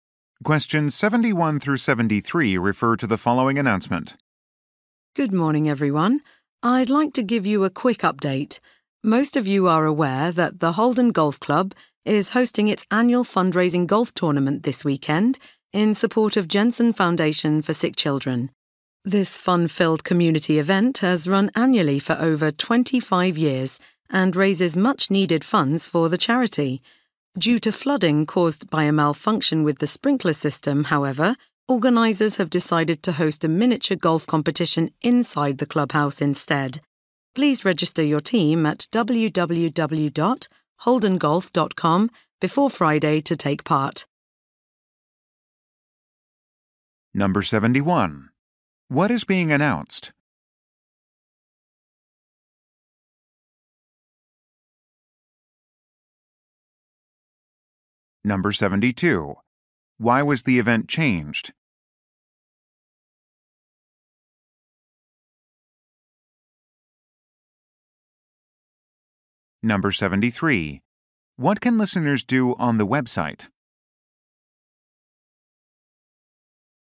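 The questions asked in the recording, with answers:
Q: What is being announced?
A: A change to the annual charity golf tournament (now a miniature golf competition in the clubhouse)

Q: Why was the event changed?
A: Flooding caused by a sprinkler system malfunction

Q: What can listeners do on the website?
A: Register a team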